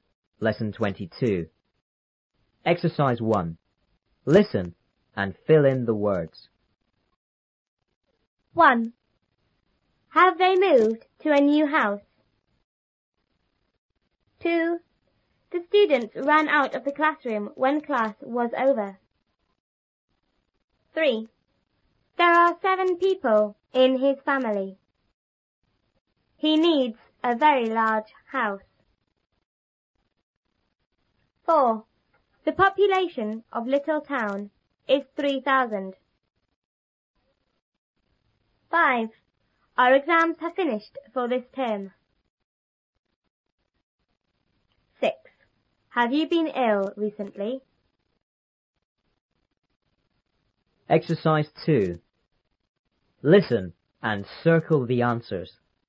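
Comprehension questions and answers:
1.Listen and fill in the words.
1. ___they___to a new house?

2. The students___out of the classroom when class was___.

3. He___a very___house.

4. The population of Little Town is___ ___.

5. Our exams have finished___ ___ ___.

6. Have you been ill___?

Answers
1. Have; moved
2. ran; over
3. needs; large
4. three thousand
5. for this term
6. recently

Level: 初中英语广州版3B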